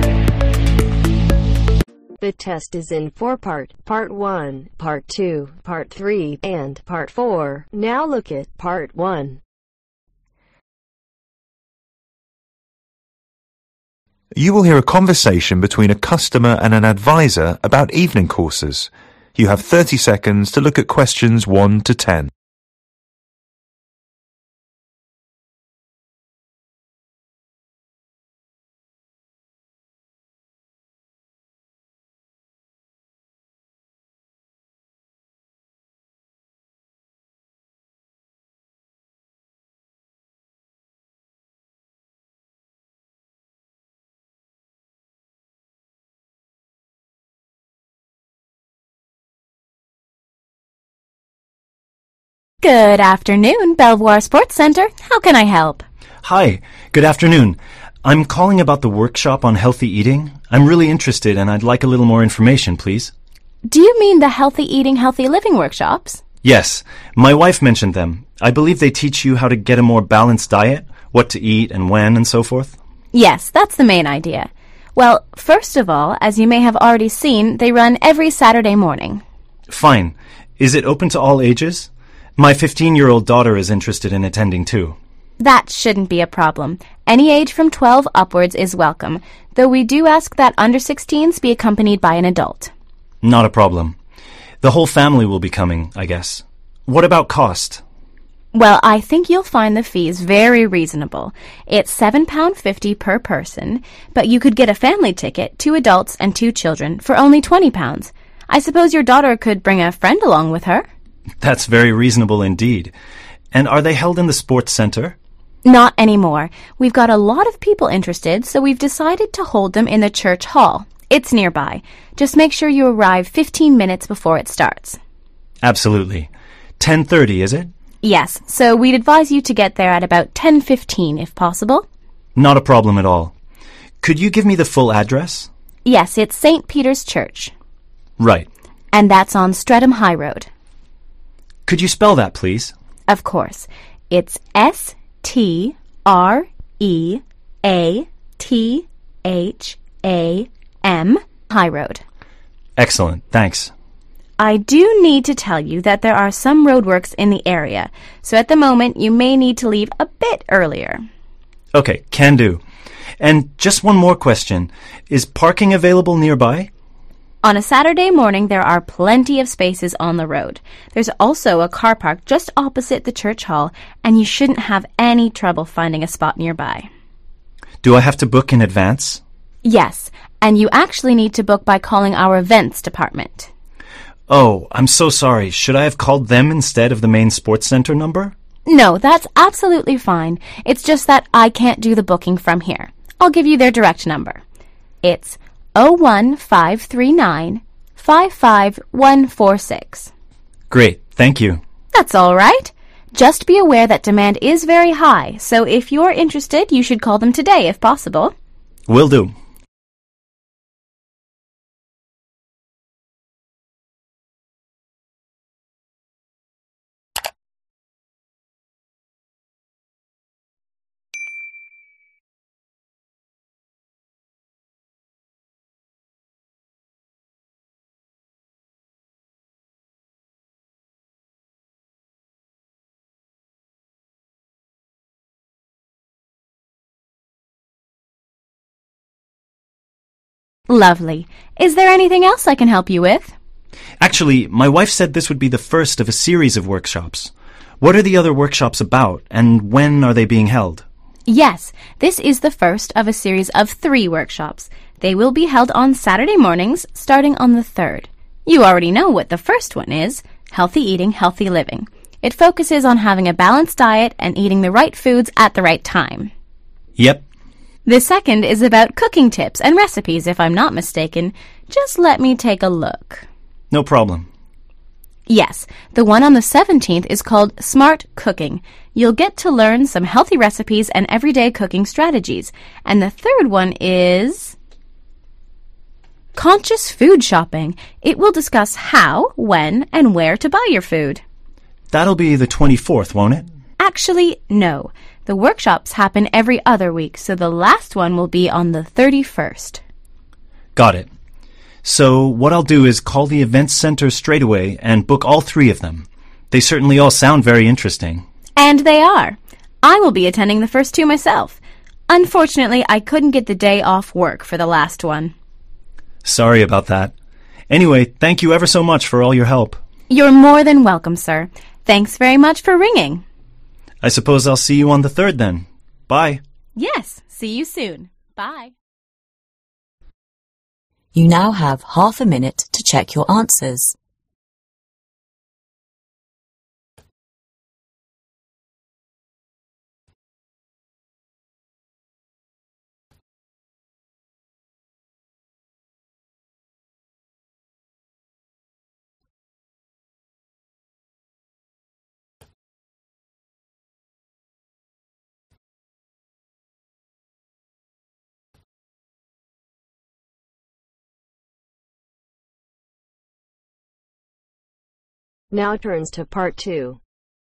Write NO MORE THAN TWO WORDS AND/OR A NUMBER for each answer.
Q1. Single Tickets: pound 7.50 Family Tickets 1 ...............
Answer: pound 20/20 pound

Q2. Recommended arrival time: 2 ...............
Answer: 10.15

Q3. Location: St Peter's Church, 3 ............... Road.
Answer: Streatham high

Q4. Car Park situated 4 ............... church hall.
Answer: opposite

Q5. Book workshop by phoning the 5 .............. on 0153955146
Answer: events department

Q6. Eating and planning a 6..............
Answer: balanced diet

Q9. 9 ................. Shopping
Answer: Conscious Food

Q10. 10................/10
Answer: 31